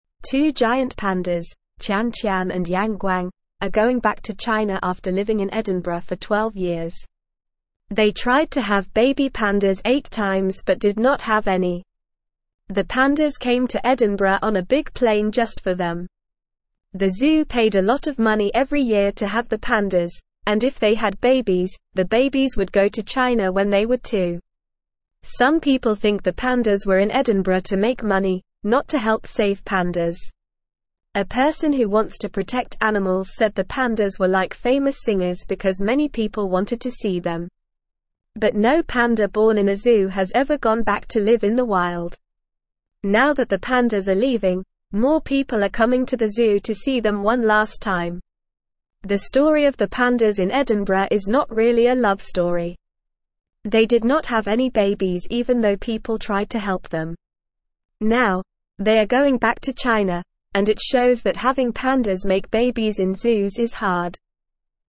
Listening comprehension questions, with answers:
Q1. Two giant (1)______, Tian Tian and Yang Guang, are going back to China after living in Edinburgh for 12 years.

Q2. They (2)______ to (3)______ baby pandas eight times but did not have any.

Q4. The zoo paid a lot of (4)______ every year to have the pandas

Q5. Some people (5)______ the pandas were in Edinburgh to make money, not to (6)______ save pandas.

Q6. Some people (5)______ the pandas were in Edinburgh to make money, not to (6)______ save pandas.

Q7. A person who wants to protect animals said the pandas were like famous (7)______ because many people wanted to see them.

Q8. But no panda born in a zoo has ever (8)______ back to live in the (9)______.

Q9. But no panda born in a zoo has ever (8)______ back to live in the (9)______.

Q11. The (10)______ of the pandas in Edinburgh is not really a (11)______ story.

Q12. They did not have any (12)______ even though people tried to help them.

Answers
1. pandas
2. tried
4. money
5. think
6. help
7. singers
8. gone
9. wild
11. love
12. babies

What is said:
Two giant pandas, Tian Tian and Yang Guang, are going back to China after living in Edinburgh for 12 years. They tried to have baby pandas eight times but did not have any. The pandas came to Edinburgh on a big plane just for them. The zoo paid a lot of money every year to have the pandas, and if they had babies, the babies would go to China when they were two.
Some people think the pandas were in Edinburgh to make money, not to help save pandas. A person who wants to protect animals said the pandas were like famous singers because many people wanted to see them. But no panda born in a zoo has ever gone back to live in the wild. Now that the pandas are leaving, more people are coming to the zoo to see them one last time.
The story of the pandas in Edinburgh is not really a love story. They did not have any babies even though people tried to help them. Now, they are going back to China, and it shows that having pandas make babies in zoos is hard.

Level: Level 2